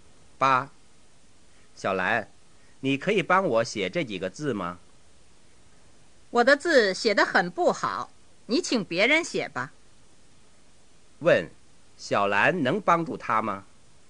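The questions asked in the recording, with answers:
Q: 小兰能帮助他吗?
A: 不能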